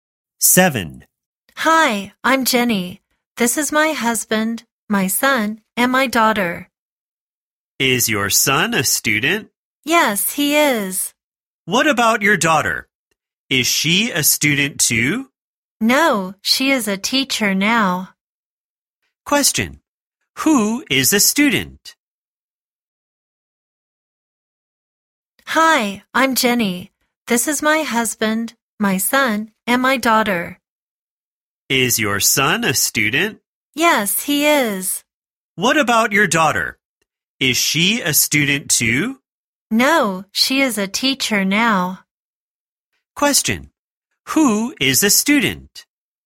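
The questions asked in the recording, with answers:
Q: Question, who is a student?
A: Jenny's son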